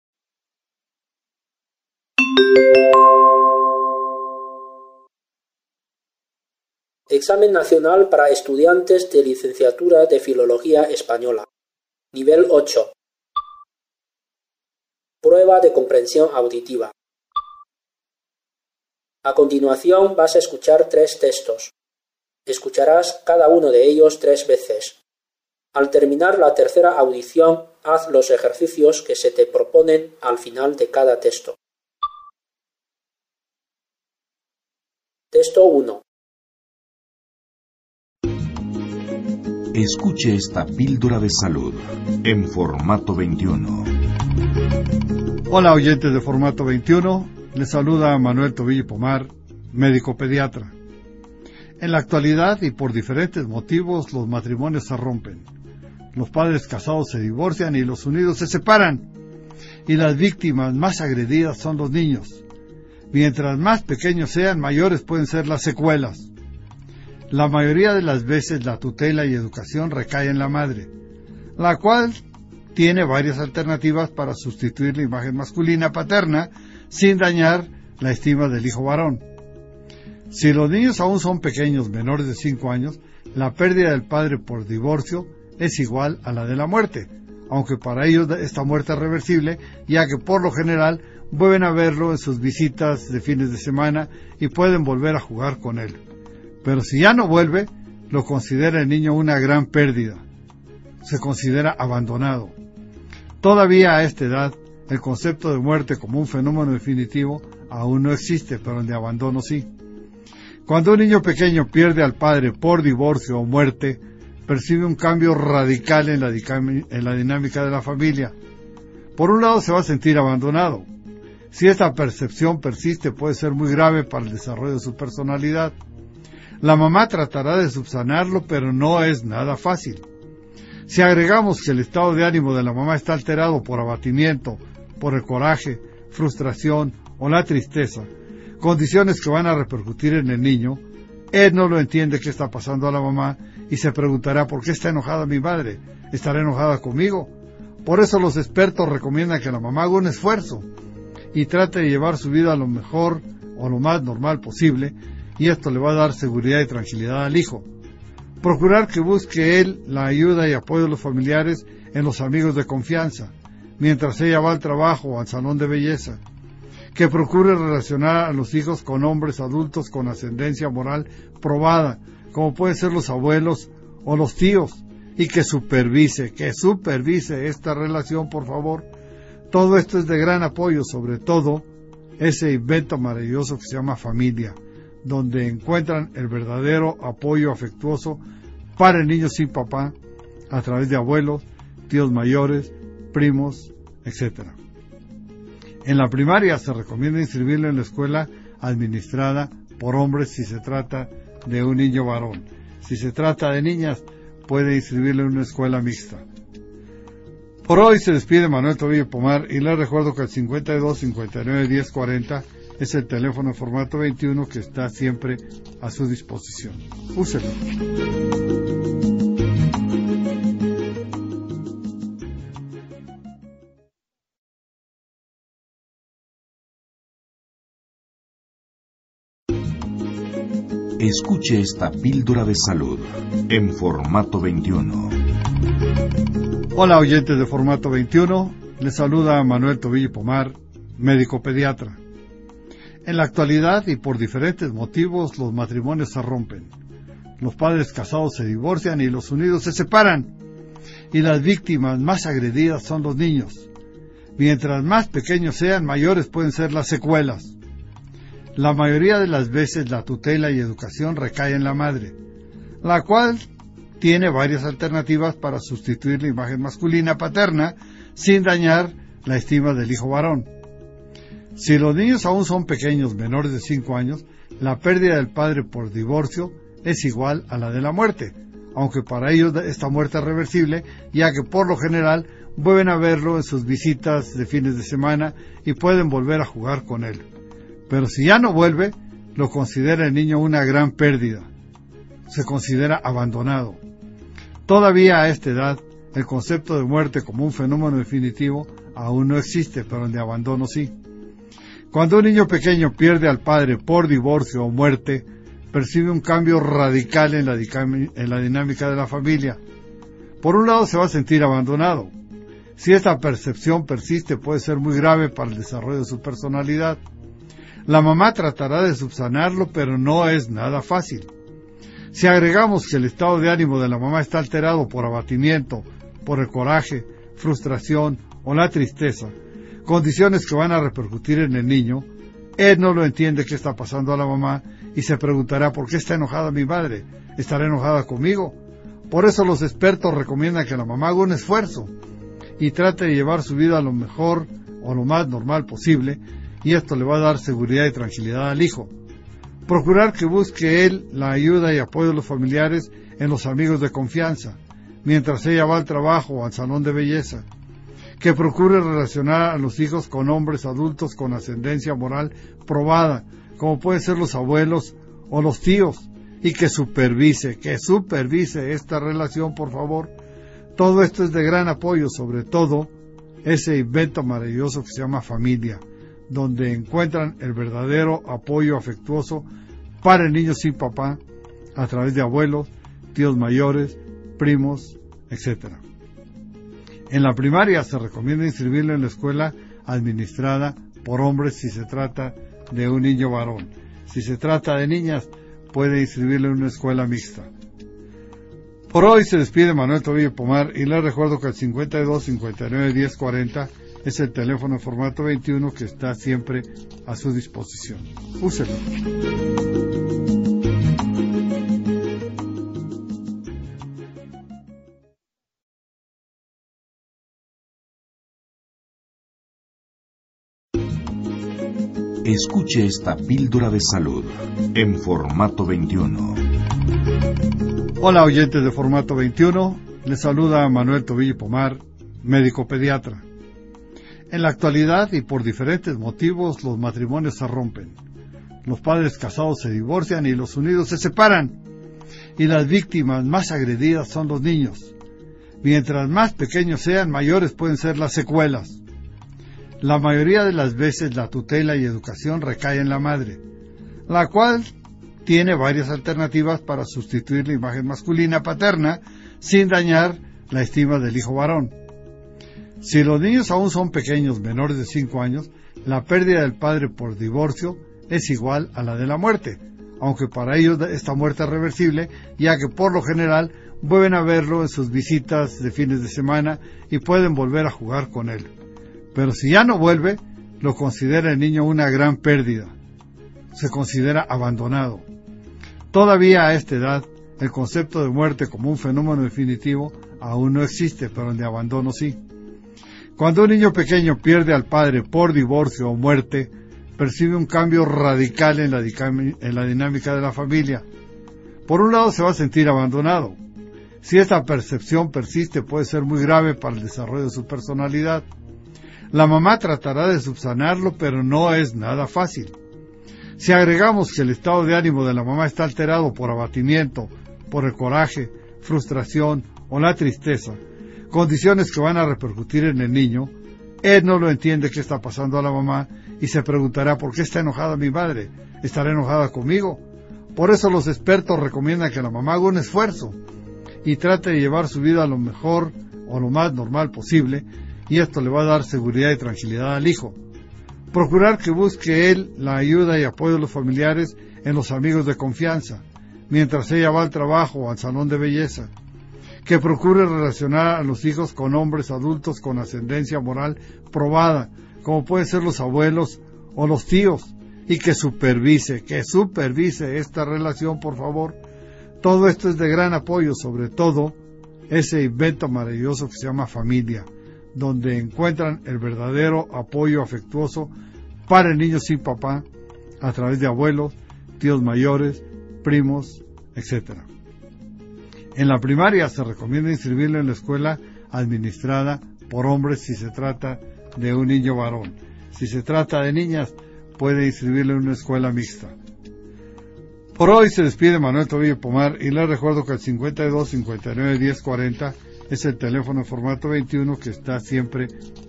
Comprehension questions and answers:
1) En la mayoría de los casos, ¿ qué tiene que hacer la madre tras el divorcio?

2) Para un ni ñ o menor de cinco a ñ os, ¿ por qué la pérdida del padre por el divorcio es por lo general igual a una muerte reversible?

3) ¿ Qué efectos negativos se pueden producir en el ni ñ o, si la sensación de abandono persiste?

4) ¿ Cómo afecta al ni ñ o el estado de ánimo de la madre divorciada?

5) ¿ Qué debe hacer la madre para dar seguridad y tranquilidad al hijo?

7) ¿ Qué se recomienda para la familia monoparental (单亲的) a la hora de elegir escuela primaria al ni ñ o o ni ñ a?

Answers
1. Tiene que asumir la tutela y educación del ni ñ o, y encontrar alternativa para sustituir la imagen masculina paterna sin da ñ ar la estima del hijo varón.
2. Porque el padre puede volver a verlo los fines de semana y jugar con él.
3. El desarrollo de la personalidad del ni ñ o puede estar seriamente da ñ ado.
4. Los altibajos del estado de ánimo de la mamá dejan al ni ñ o perplejo, ya que no sabe si la madre está enojada con él ni por qué está enojada con él.
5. La madre debe hacer esfuerzos por llevar su vida lo mejor o lo más normal posible.
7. Para el ni ñ o varón se recomienda inscribir en una escuela administrada por hombres, y para una ni ñ a, inscribir en una escuela mixta.

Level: 专业八级